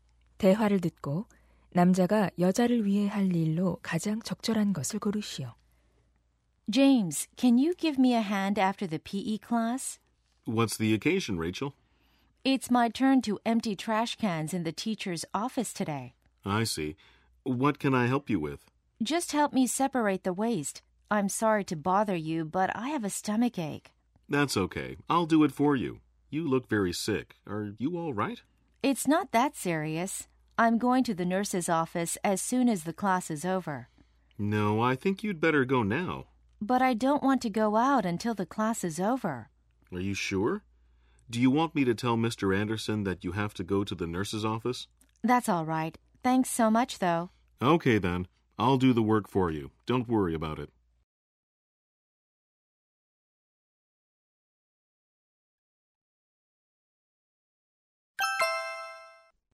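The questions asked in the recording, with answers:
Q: 대화를 듣고 남자가 여자를 위해 할 일로 가장 적절한 것을 고르시오.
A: 교무실 쓰레기통 비우기(쓰레기 분리)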